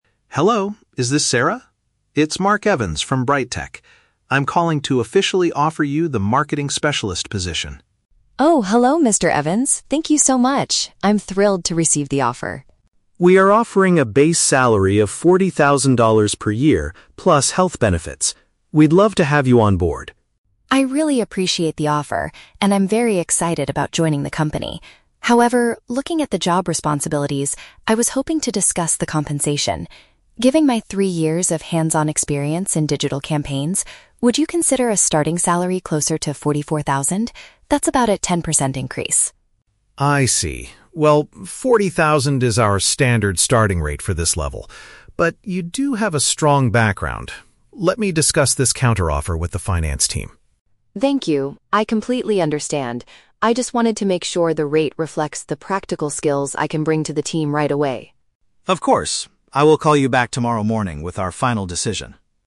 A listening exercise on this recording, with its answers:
Listen to the telephone conversation between a job applicant and an HR director. Choose the correct answer (A, B, or C) for each question.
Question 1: What is the main purpose of Sarah's response to the job offer?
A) To formally accept the position immediately.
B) To request a higher amount of financial compensation.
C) To ask for more vacation days as part of her benefits.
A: To request a higher amount of financial compensation.

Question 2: How does Sarah justify her request?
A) By highlighting her practical background in the field.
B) By mentioning she has a better offer from another company.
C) By stating she has a higher university degree than required.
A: By highlighting her practical background in the field.

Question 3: What will Mr. Evans do next?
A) He will send her a new contract with the higher salary right away.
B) He will consult with another department about her proposal.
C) He will withdraw the job offer and find a different candidate.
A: He will consult with another department about her proposal.

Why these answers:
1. Sarah says she wants to "discuss the compensation" and asks for "a starting salary closer to forty-four thousand" instead of forty thousand. Option (B) accurately paraphrases this negotiation. Option (A) is The Trap: She says she is "thrilled" and "excited", but she does not accept the offer immediately; she pauses to negotiate. Option (C) is not mentioned.
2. Sarah bases her request on her "three years of hands-on experience" and the "practical skills" she can bring to the team. Option (A) uses synonyms to express this (hands-on experience = practical background). Option (B) and (C) are plausible reasons for negotiating a salary in real life, but they are never mentioned in the audio.
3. Mr. Evans says, "Let me discuss this counter-offe

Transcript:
Mr. Evans: Hello, is this Sarah? It's Mark Evans from BrightTech. I'm calling to officially offer you the Marketing Specialist position.
Sarah: Oh, hello Mr. Evans! Thank you so much. I'm thrilled to receive the offer.
Mr. Evans: We are offering a base salary of forty thousand dollars per year, plus health benefits. We'd love to have you on board.
Sarah: I really appreciate the offer, and I'm very excited about joining the company. However, looking at the job responsibilities, I was hoping to discuss the compensation. Given my three years of hands-on experience in digital campaigns, would you consider a starting salary closer to forty-four thousand? That's about a 10% increase.
Mr. Evans: I see. Well, forty thousand is our standard starting rate for this level. But you do have a strong background... Let me discuss this counter-offer with the finance team.
Sarah: Thank you, I completely understand. I just wanted to make sure the rate reflects the practical skills I can bring to the team right away.
Mr.

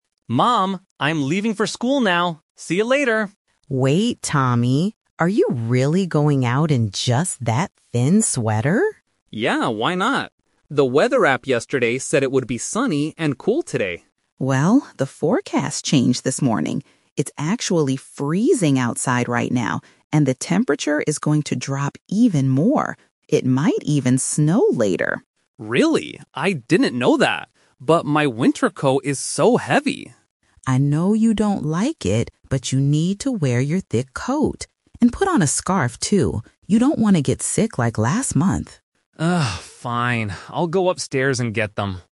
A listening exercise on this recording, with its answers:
Listen to the conversation and choose the correct answer (A, B, or C).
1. What did the son think the weather would be like today?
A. Freezing and snowy.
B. Sunny and cool.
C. Rainy and windy.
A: Sunny and cool.

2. Why does the mother stop her son before he leaves?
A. He is only wearing a thin sweater.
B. He forgot to bring his phone.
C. He is currently very sick.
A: He is only wearing a thin sweater.

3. What will the son wear to school in the end?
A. Only a thin sweater.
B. A heavy sweater and gloves.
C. A thick coat and a scarf.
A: A thick coat and a scarf.

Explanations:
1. The son says, "The weather app yesterday said it would be sunny and cool today." Option (A) is the trap because that is the actual weather the mother describes, not what the son thought. Option (C) is a plausible weather condition but is never mentioned in the audio.
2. The mother stops him by asking, "Are you really going out in just that thin sweater?" Option (B) is not mentioned. Option (C) is a trap; the mother mentions he was sick "like last month," but he is not sick right now.
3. The mother tells him, "you need to wear your thick coat. And put on a scarf, too," and the son finally agrees ("fine. I'll go upstairs and get them"). Option (A) is a trap because it was his initial plan (Plan A) before the "twist". Option (B) is a trap because "gloves" are not mentioned in the conversation.

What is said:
Son: Mom, I'm leaving for school now! See you later.
Mom: Wait, Tommy. Are you really going out in just that thin sweater?
Son: Yeah, why not? The weather app yesterday said it would be sunny and cool today.
Mom: Well, the forecast changed this morning. It's actually freezing outside right now, and the temperature is going to drop even more. It might even snow later.
Son: Really? I didn't know that. But my winter coat is so heavy.
Mom: I know you don't like it, but you need to wear your thick coat. And put on a scarf, too. You don't want to get sick like last month.

